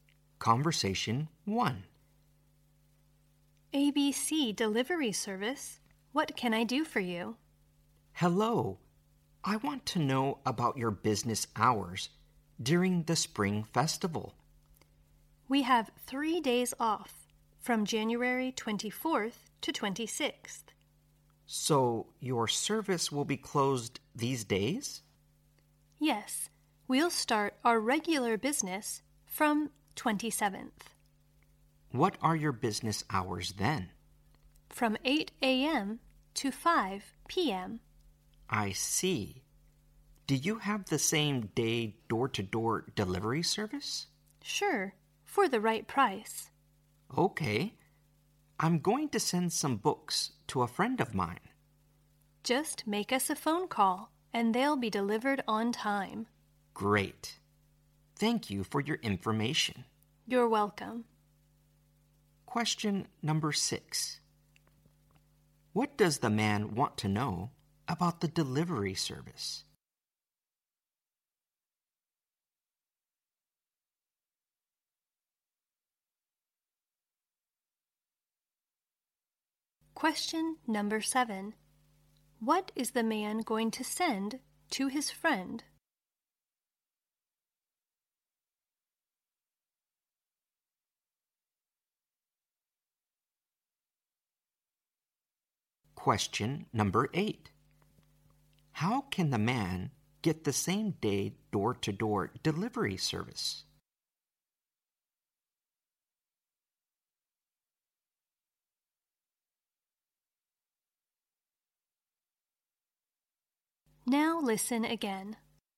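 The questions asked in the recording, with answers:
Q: What does the man want to know about the delivery service?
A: Its business hours during the Spring Festival

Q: What is the man going to send to his friend?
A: Some books

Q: How can the man get the same day door-to-door delivery service?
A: By making a phone call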